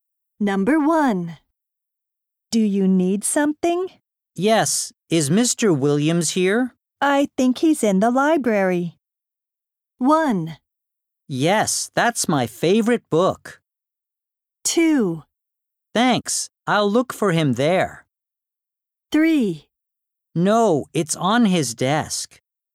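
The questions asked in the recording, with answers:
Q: I think he's in the library.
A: 2: Thanks. I'll look for him there.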